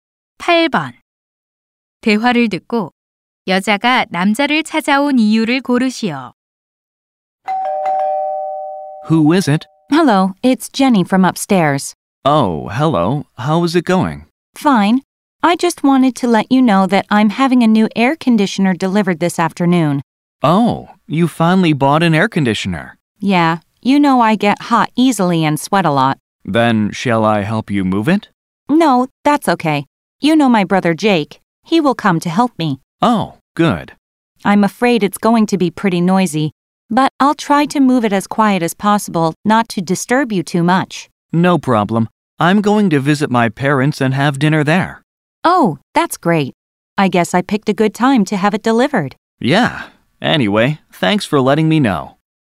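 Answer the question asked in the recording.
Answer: 에어컨 배달로 시끄러울 것을 미리 알리려고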